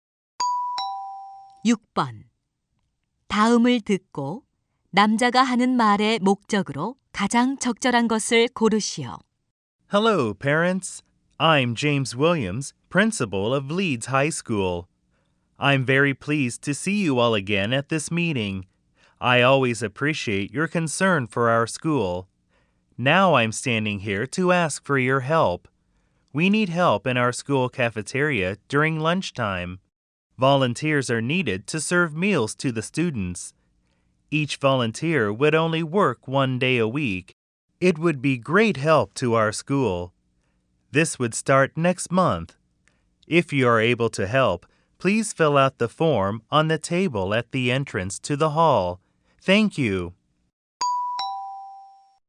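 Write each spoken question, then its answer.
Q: 다음을 듣고 남자가 하는 말의 목적으로 가장 적절한 것을 고르시오.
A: 학교 식당 급식 자원봉사자 모집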